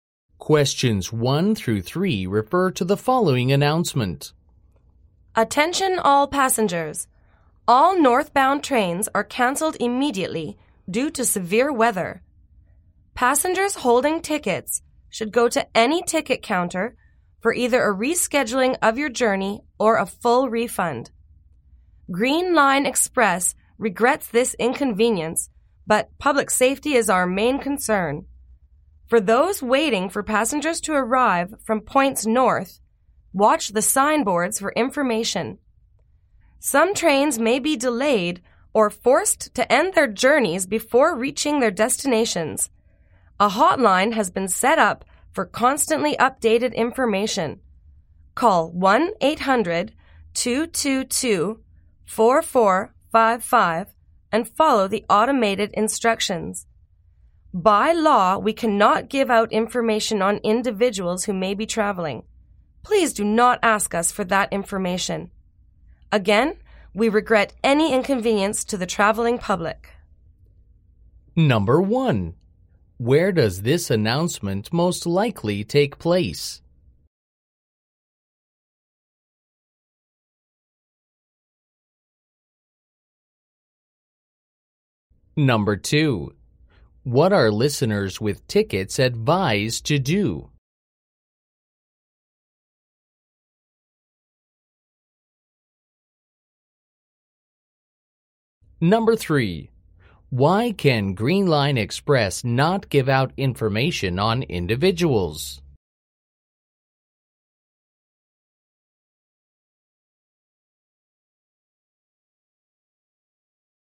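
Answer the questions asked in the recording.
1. At a train station
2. Go to a ticket counter to reschedule or get a full refund
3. Because it is against the law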